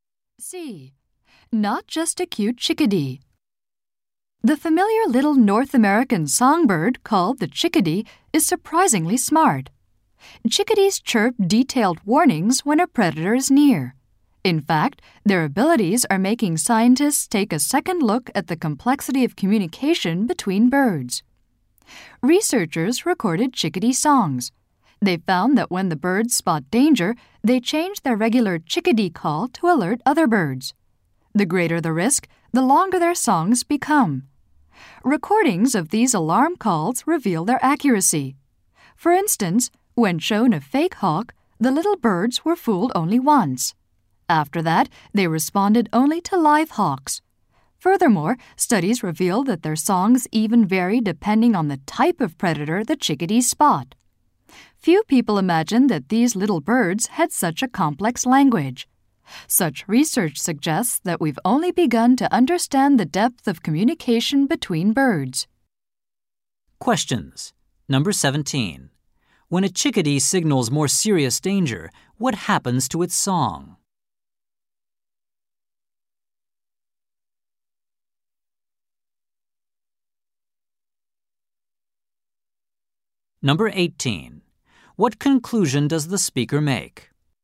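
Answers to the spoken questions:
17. It becomes longer
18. Bird communication is more complex than we understood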